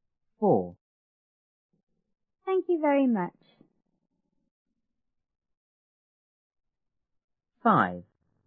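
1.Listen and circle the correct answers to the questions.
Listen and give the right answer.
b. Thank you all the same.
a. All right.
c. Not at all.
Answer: c. Not at all.

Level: 初中英语广州版1B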